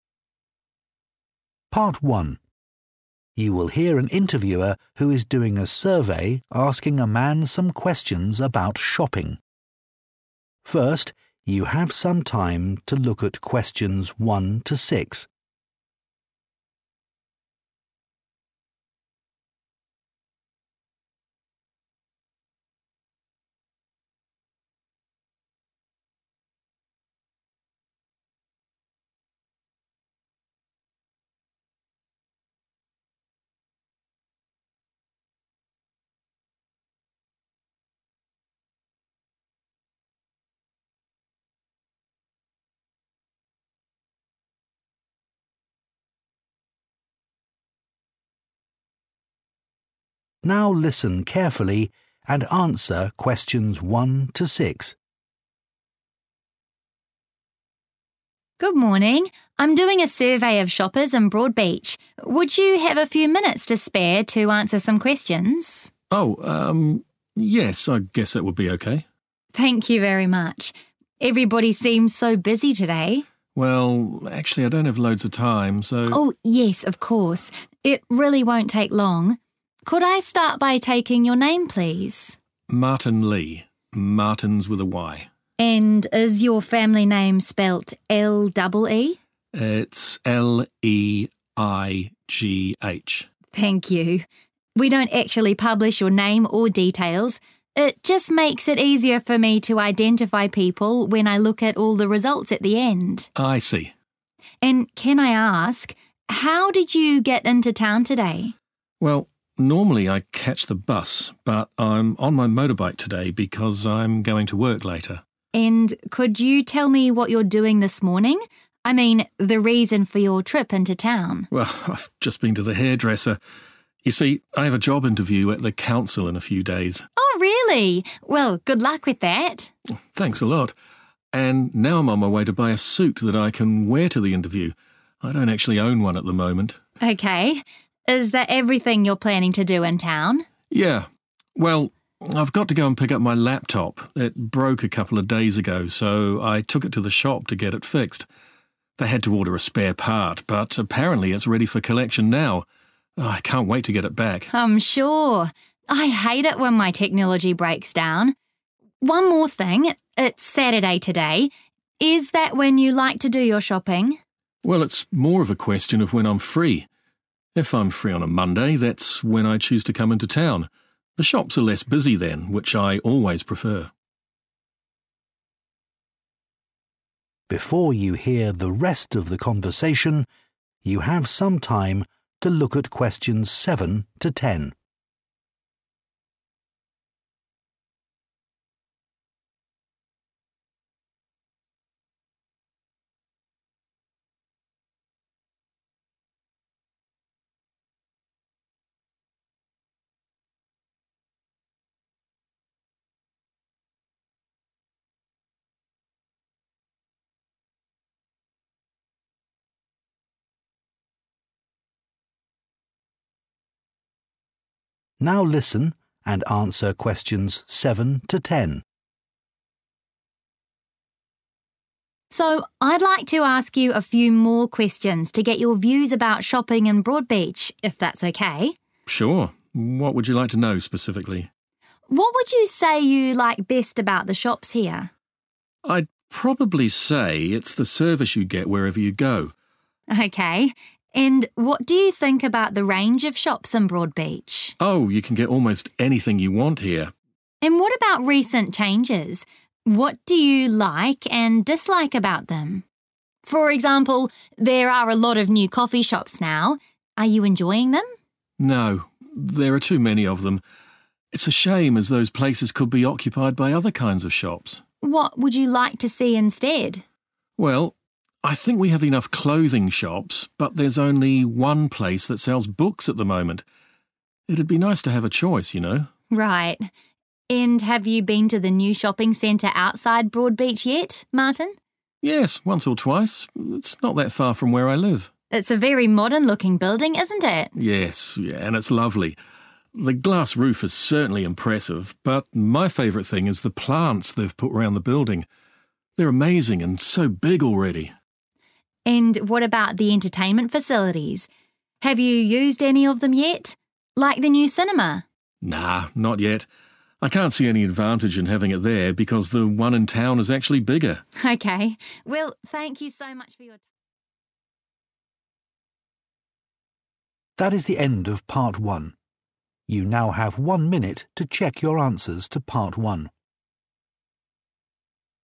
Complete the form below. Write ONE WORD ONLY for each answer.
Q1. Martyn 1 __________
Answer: Leigh

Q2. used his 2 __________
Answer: motorbike

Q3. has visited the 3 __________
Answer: hairdresser

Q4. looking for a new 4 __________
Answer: suit

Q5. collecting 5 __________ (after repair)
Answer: laptop

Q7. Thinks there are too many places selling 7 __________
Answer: coffee

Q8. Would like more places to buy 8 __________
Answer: books

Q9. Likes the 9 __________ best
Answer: plants

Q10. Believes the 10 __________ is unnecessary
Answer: cinema

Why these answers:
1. Người nam đánh vần tên họ của mình là L-E-I-G-H
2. Người phụ nữ hỏi Martyn vào thị trấn bằng gì, và Martyn trả lời là đi bằng xe máy do lát nữa phải đi làm
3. Khi người phụ nữ hỏi lí do vào thị trấn, Martyn đã trả lời là đến tiệm cắt tóc
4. Martyn đang đi mua suit để mặc đi phỏng vấn
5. Martyn cần đi lấy lại chiếc laptop anh ấy mang đi sửa vài ngày trước
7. Martyn cảm thấy có quá nhiều quán cà phê
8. Martyn muốn có nhiều hiệu sách hơn để có thể lựa chọn giữa các hiệu sách, thay vì chỉ có thể mua ở một hiệu như hiện tại
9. Martyn thích nhất là các loại cây được trồng quanh khu trung tâm thương mại
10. Martyn thấy rạp chiếu phim mới không hữu dụng lắm vì rạp cũ ở thị trấn lớn hơn

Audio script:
Part 1. You will hear an interviewer who is doing a survey asking a man some questions about shopping. First, you have some time to look at questions 1 to 6. (Pause) Now listen carefully and answer questions 1 to 6.
Interviewer: Good morning! I'm doing a survey of shoppers in Broadbeach. Would you have a few minutes to spare to answer some questions?
Martin: Oh, um... yes, I guess that would be okay.
Interviewer: Thank you very much! Everybody seems so busy today.
Martin: Well, actually I don't have loads of time, so...
Interviewer: Oh, yes, of course. It really won't take long. Could I start by taking your name, please?
Martin: Martin Lee. Martin's with a 'y' (Martyn).
Interviewer: And is your family name spelled L-E-E?
Martin: It's L-E-I-G-H.
Interviewer: Thank you. We don't actually publish your name or details. It just makes it easier for me to identify people when I look at all the results at the end.
Martin: I see.
Interviewer: And can I ask, how did you get into town today?
Martin: Well, normally I catch the bus, but I'm on my motorbike today because I'm going to work later.
Interviewer: And could you tell me what you're doing this morning? I mean, the reason for your trip into town.
Martin: Well, I've just been to the hairdresser. You see, I have a job interview at the council in a few days.
Interviewer: Oh, really? Well, good luck with that!
Martin: Thanks a lot. And now I'm on my way to buy a suit that I can wear to the interview. I don't actually own one at the moment.
Interviewer: Okay. Is that everything you're planning to do in town?
Martin: Yeah. Well, I've got to go and pick up my laptop. It broke a couple of days ago, so I took it to the shop to get it fixed. They had to order a spare part, but apparently, it's ready for collection now. I can't wait to get it back.
Interviewer: I'm sure! I hate it when my technology breaks down. One more thing, it's Saturday today. Is that when you like to do your shopping?
Martin: Well, it's more of a question of when I'm free. If I'm free on a Monday, that's when I choose to come into town. The shops are less busy then, which I always prefer.
Before you hear the rest of the conversation, you have some time to look at questions 7 to 10. (Pause) Now listen and answer questions 7 to 10.
Interviewer: So, I'd like to ask you a few more questions to get your views about shopping in Broadbeach, if that's okay.
Martin: Sure. What would you like to know specifically?
Interviewer: What would you say you like best about the shops here?
Martin: I'd probably say it's the service you get wherever you go.
Interviewer: Okay. And what do you think about the range of shops in Broadbeach?
Martin: Oh, you can get almost anything you want here.
Interviewer: And what about recent changes? What do you like and dislike about them? For example, there are a lot of new coffee shops now. Are you enjoying them?
Martin: No, there are too many of them. It's a shame as those places could be occupied by other kinds of shops.
Martin: Well, I think we have enough clothing shops, but there's only one place that sells books at the moment. It'd be nice to have a choice, you know?
Interviewer: Right. And have you been to the new shopping center outside Broadbeach yet, Martin?
Martin: Yes, once or twice. It's not that far from where I live.
Interviewer: It's a very modern-looking building, isn't it?
Martin: Yes, yes, and it's lovely. The glass roof is certainly impressive, but my favorite thing is the plants they've put around the building. They're amazing and so big already.
Interviewer: And what about the entertainment facilities? Have you used any of them yet? Like the new cinema?
Martin: Nah, not yet. I can't see any advantage in having it there because the one in town is actually bigger.
Interviewer: Okay. Well, thank you so much for your time...
That is the end of part 1. You now have one minute to check your answers to part 1.